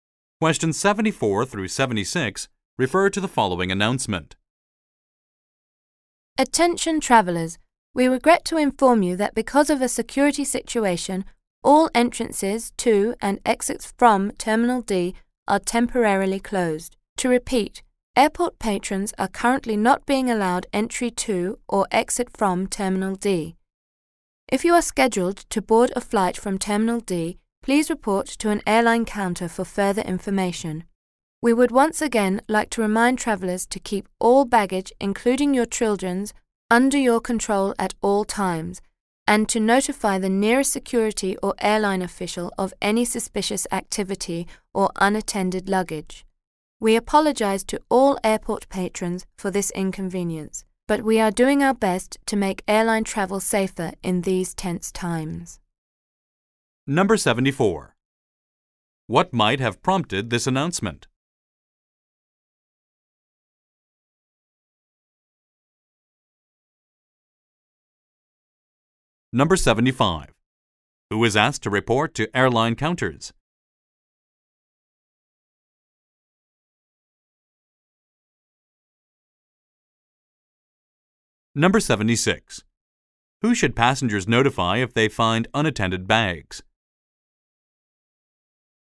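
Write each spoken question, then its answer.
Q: What might have prompted this announcement?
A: A security situation

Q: Who is asked to report to airline counters?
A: Passengers scheduled to board flights from Terminal D

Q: Who should passengers notify if they find unattended bags?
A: The nearest security or airline official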